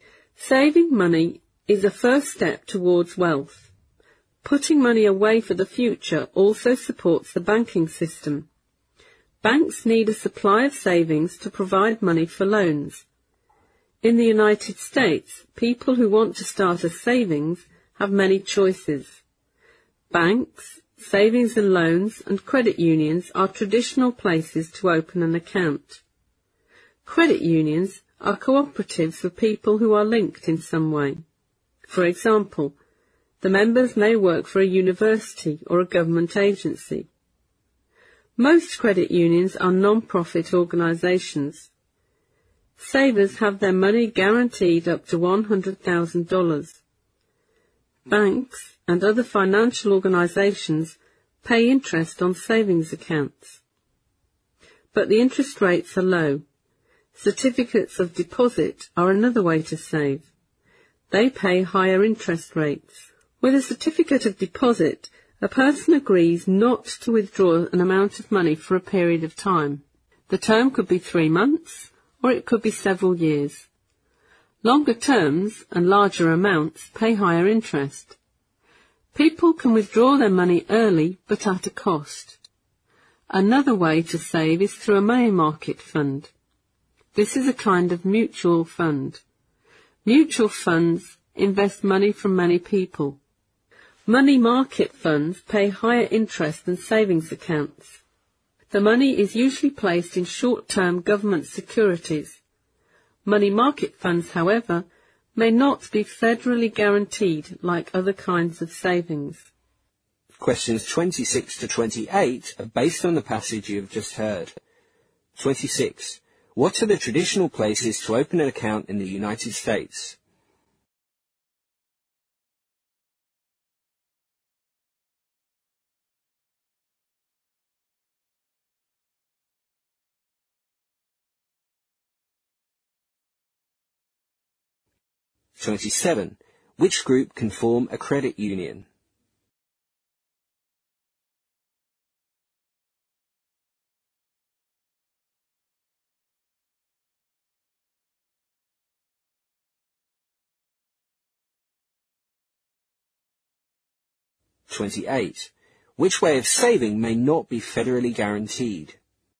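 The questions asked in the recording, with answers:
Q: What are the traditional places to open an account in the United States?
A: Banks, savings and loans, and credit unions

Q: Which group can form a credit union?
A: People linked in some way, such as people working for a university or a government agency

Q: Which way of saving may not be federally guaranteed?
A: Money market funds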